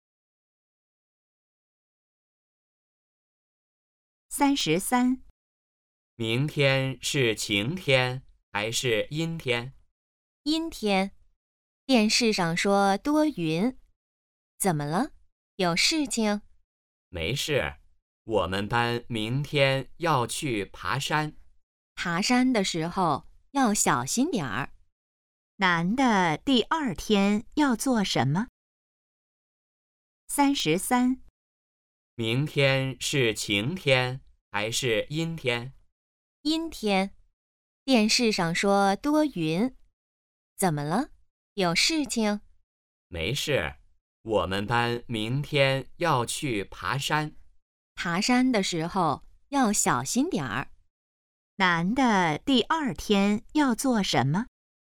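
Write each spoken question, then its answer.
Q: 男的第二天要做什么?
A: 去爬山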